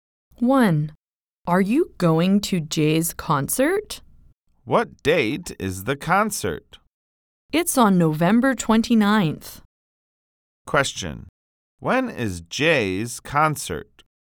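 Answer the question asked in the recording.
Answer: November 29th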